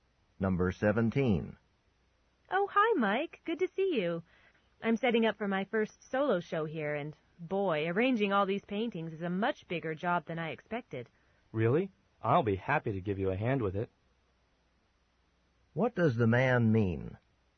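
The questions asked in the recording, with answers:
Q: What does the man mean?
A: He will help her arrange the paintings.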